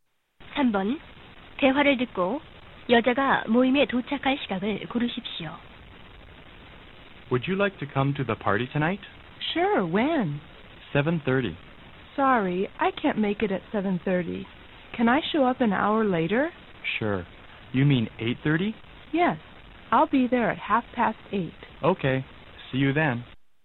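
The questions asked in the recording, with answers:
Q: 3번 대화를 듣고 여자가 모임에 도착할 시각을 고르십시오.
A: 8시 30분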